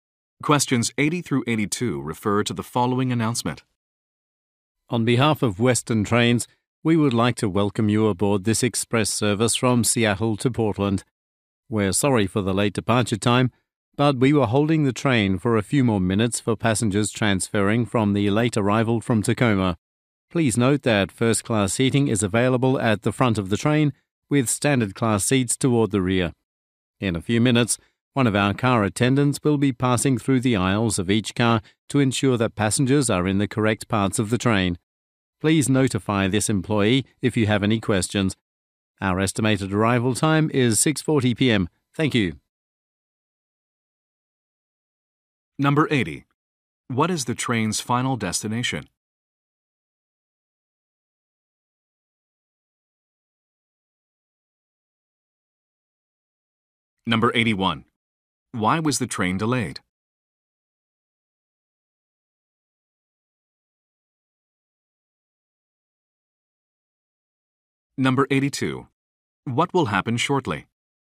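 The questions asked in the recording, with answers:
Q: What is the train's final destination?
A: Portland

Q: Why was the train delayed?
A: It waited for transferring passengers from a late train from Tacoma

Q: What will happen shortly?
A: A car attendant will check that passengers are in the correct parts of the train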